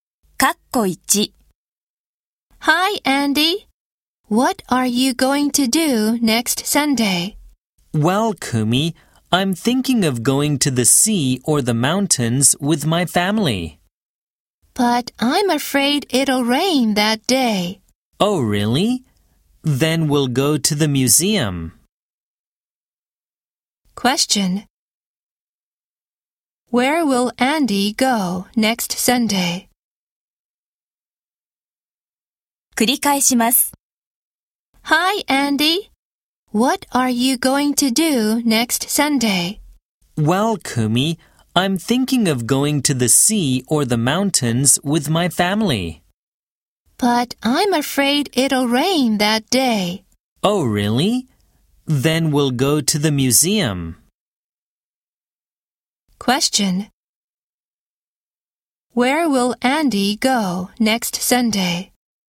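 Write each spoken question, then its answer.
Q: Where will Andy go next Sunday?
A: To the museum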